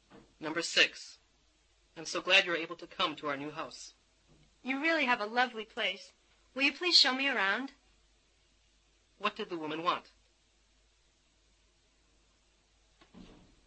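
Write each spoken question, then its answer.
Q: What did the woman want?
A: To be shown around the house.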